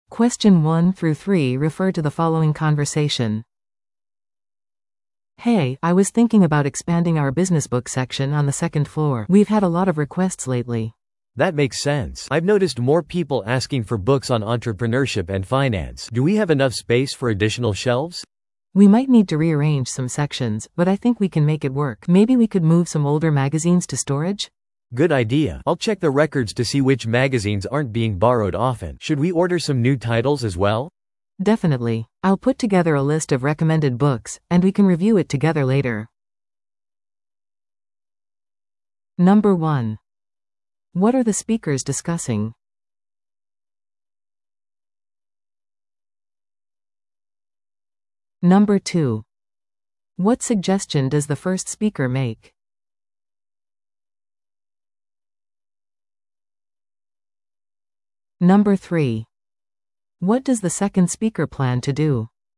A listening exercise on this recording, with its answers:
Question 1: What are the speakers discussing?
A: ビジネス書籍コーナーの拡張

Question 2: What suggestion does the first speaker make?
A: 古い雑誌を倉庫に移す

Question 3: What does the second speaker plan to do?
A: 借りられていない雑誌を調べる

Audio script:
A: "Hey, I was thinking about expanding our business book section on the second floor. We've had a lot of requests lately."
B: "That makes sense. I've noticed more people asking for books on entrepreneurship and finance. Do we have enough space for additional shelves?"
A: "We might need to rearrange some sections, but I think we can make it work. Maybe we could move some older magazines to storage?"
B: "Good idea! I'll check the records to see which magazines aren't being borrowed often. Should we order some new titles as well?"
A: "Definitely. I'll put together a list of recommended books, and we can review it together later."